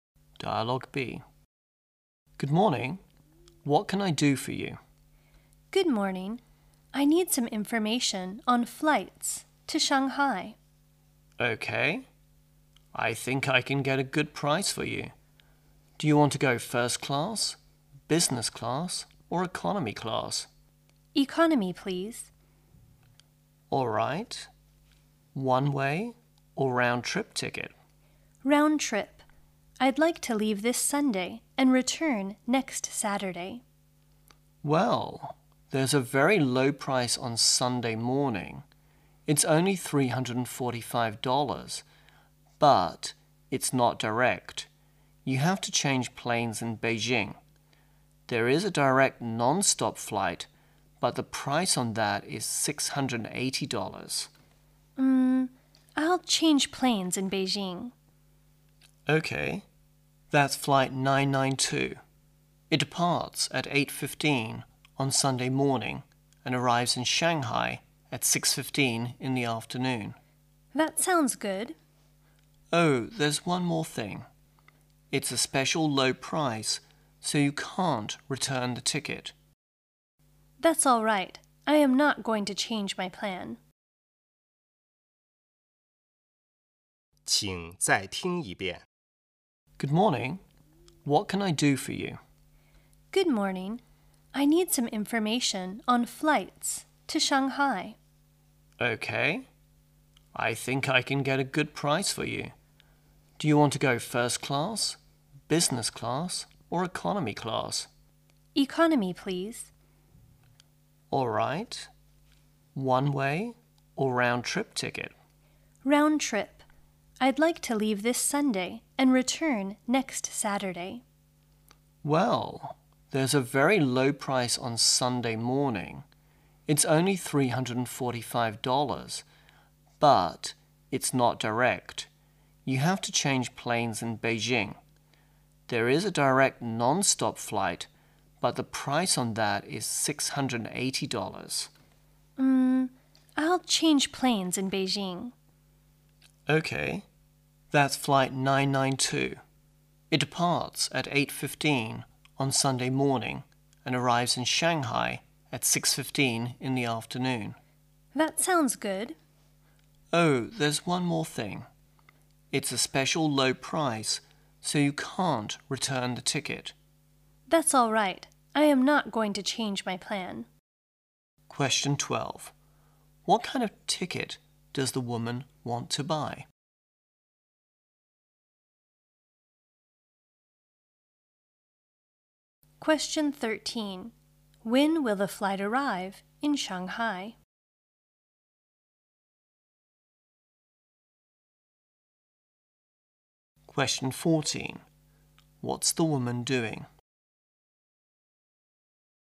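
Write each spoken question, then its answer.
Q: What kind of ticket does the woman want to buy?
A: An economy-class round-trip ticket.

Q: When will the flight arrive in Shanghai?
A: At 6:15 on Sunday afternoon.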